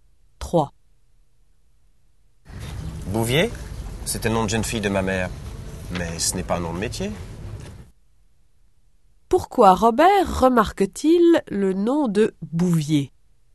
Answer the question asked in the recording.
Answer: Parce que c'est le nom de jeune fille de sa mère.